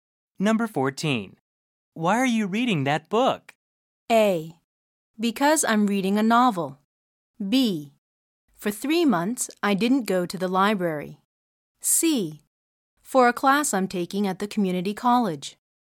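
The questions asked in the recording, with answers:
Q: Why are you reading that book?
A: C: For a class I'm taking at the community college.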